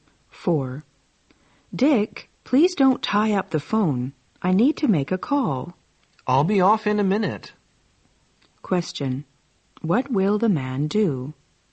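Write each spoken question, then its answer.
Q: What will the man do?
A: Get off the phone soon.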